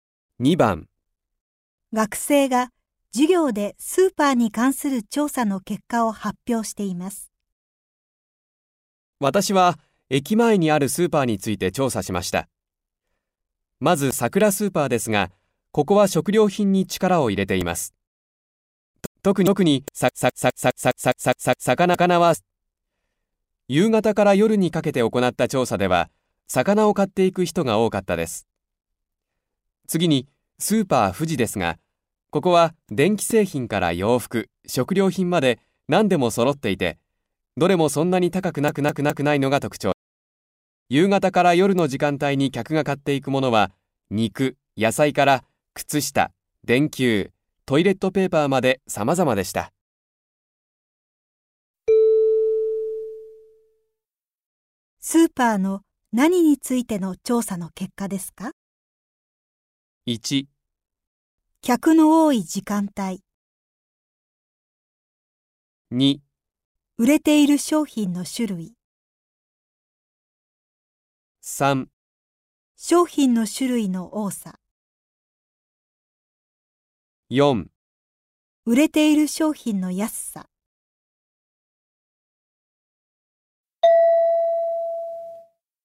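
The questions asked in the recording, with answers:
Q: スーパーの何についての調査の結果ですか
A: 2: 売れている商品の種類。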